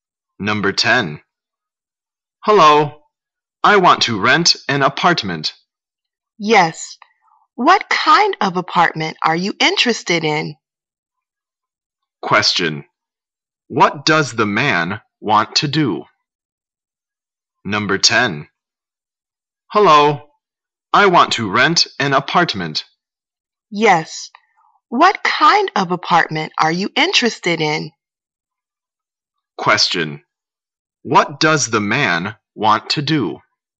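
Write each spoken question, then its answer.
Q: What does the man want to do?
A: Rent an apartment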